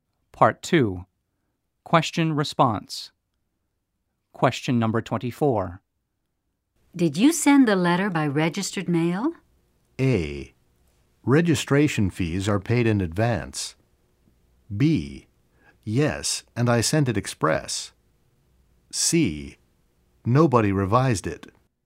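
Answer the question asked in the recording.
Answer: B: Yes, and I sent it express.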